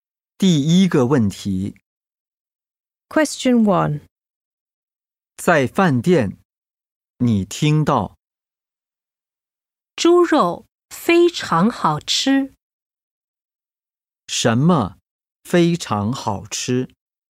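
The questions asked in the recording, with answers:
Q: 什么非常好吃?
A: 猪肉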